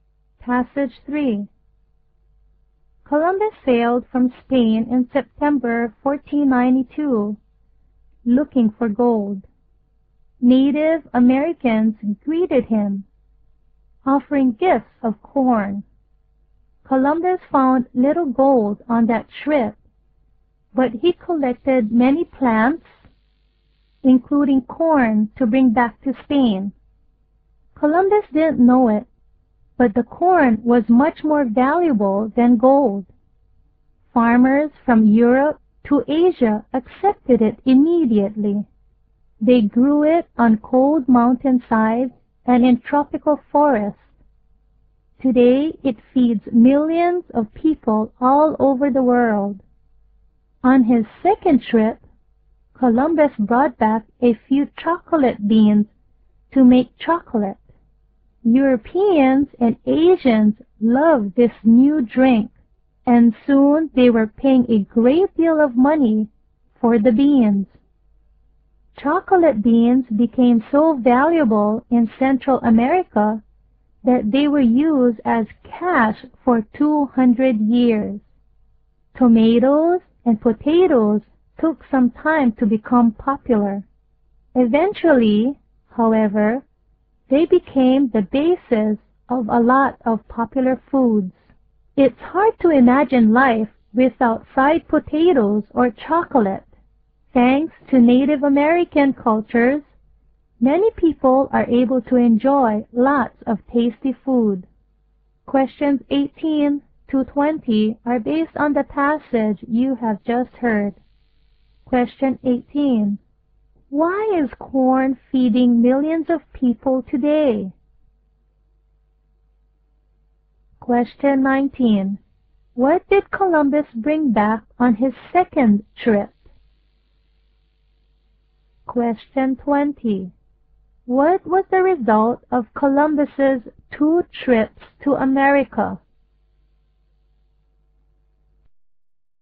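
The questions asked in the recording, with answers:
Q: Why is corn feeding millions of people today?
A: It can be grown in very different climates

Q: What did Columbus bring back on his second trip?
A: Chocolate beans

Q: What was the result of Columbus's two trips to America?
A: New foods from America became popular around the world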